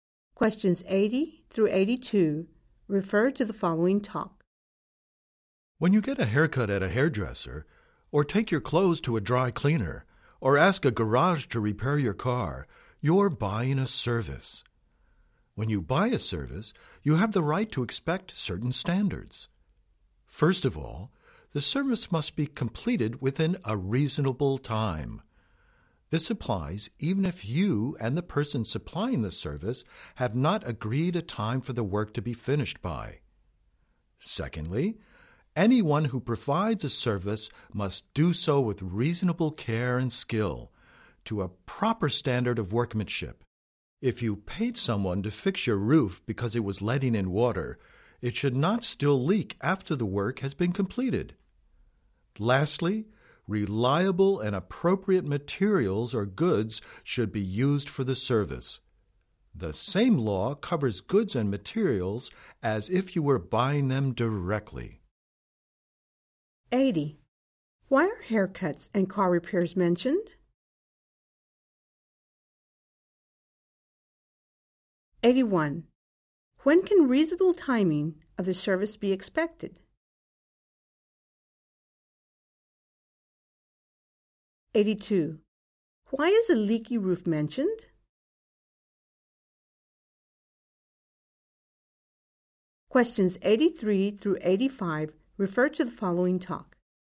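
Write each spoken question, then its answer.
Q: Why are haircuts and car repairs mentioned?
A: As examples of buying a service

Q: When can reasonable timing of the service be expected?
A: Always, even if no finishing time was agreed

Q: Why is a leaky roof mentioned?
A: As an example of the need for reasonable care and skill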